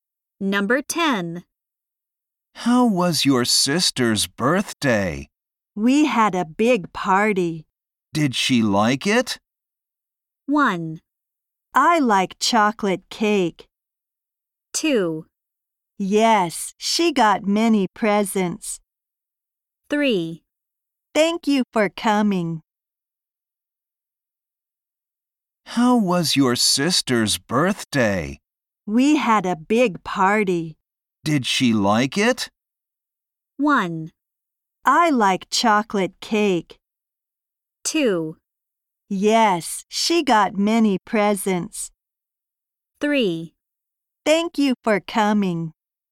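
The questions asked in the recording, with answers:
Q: Did she like it?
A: 2: Yes, she got many presents.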